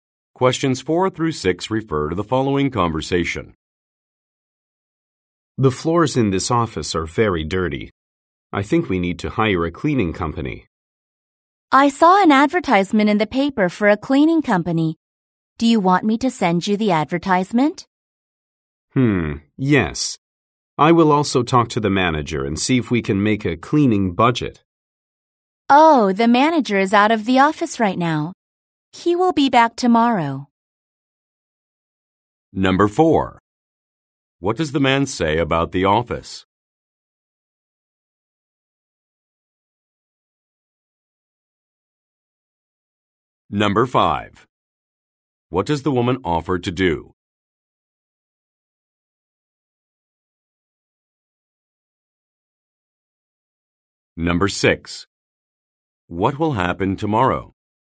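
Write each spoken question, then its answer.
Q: What does the man say about the office?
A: The floors are very dirty

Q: What does the woman offer to do?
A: Send him a cleaning company advertisement

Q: What will happen tomorrow?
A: The manager will be back in the office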